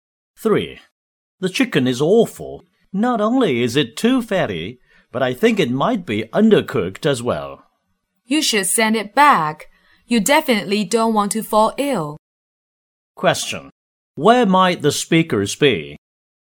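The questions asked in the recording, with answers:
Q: Where might the speakers be?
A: In a restaurant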